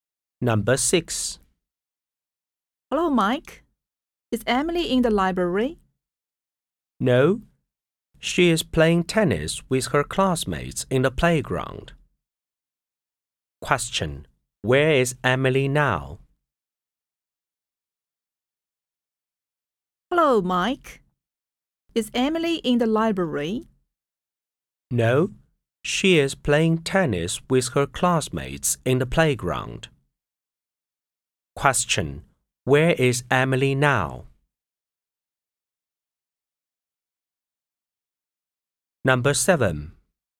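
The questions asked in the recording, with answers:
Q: Where is Emily now?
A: In the playground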